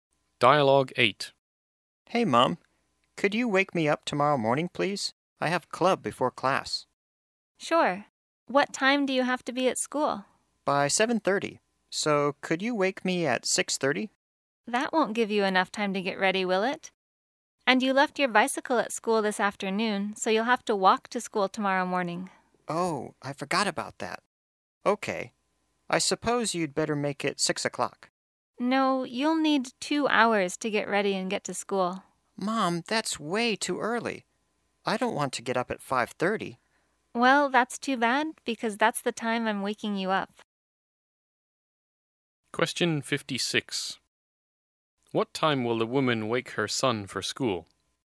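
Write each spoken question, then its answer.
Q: What time will the woman wake her son for school?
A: 5:30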